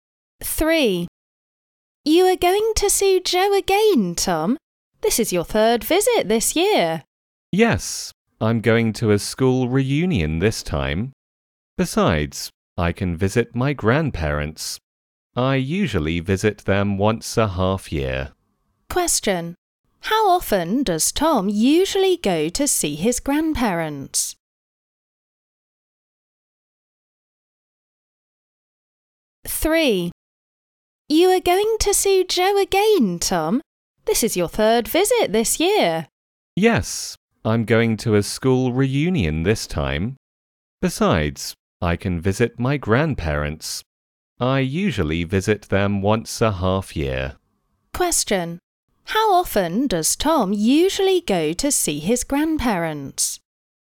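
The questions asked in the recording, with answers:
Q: How often does Tom usually go to see his grandparents?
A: Once every half year (twice a year)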